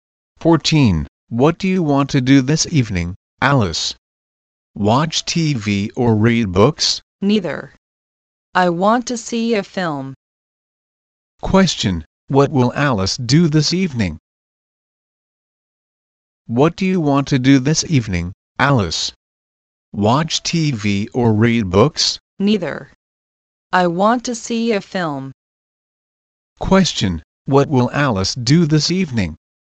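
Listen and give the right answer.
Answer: See a film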